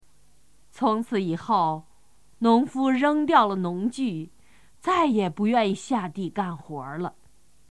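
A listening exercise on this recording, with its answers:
★音声を聞き、空欄〇に当てはまる単語を探して、授業内課題用紙に漢字とピンインを書いてください。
从此以后,农夫扔掉了农具,再也不〇〇下地干活儿了。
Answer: 愿意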